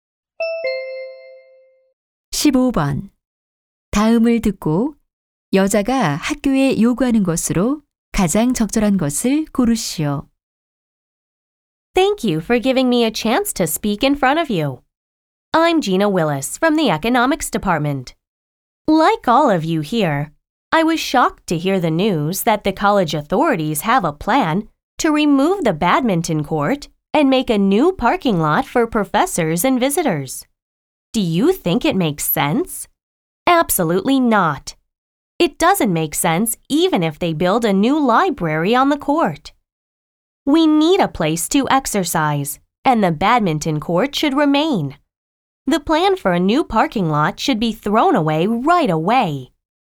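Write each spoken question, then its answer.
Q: 다음을 듣고 여자가 학교에 요구하는 것으로 가장 적절한 것을 고르시오.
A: 배드민턴장을 유지하고 주차장 계획을 철회할 것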